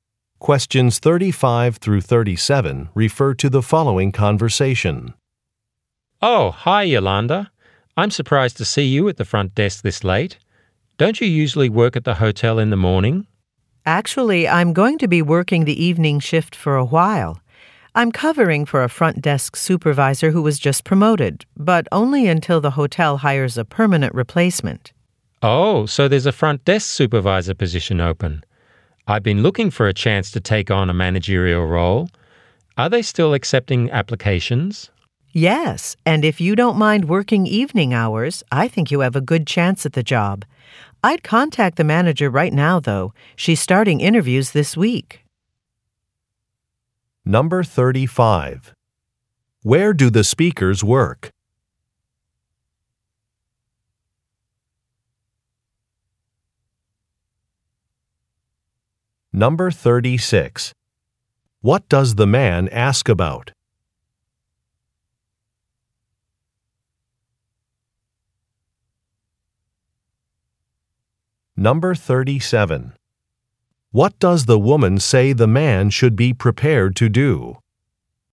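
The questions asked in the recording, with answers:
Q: Where do the speakers work?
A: At a hotel

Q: What does the man ask about?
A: Whether applications are still being accepted for the front desk supervisor job

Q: What does the woman say the man should be prepared to do?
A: Work evening hours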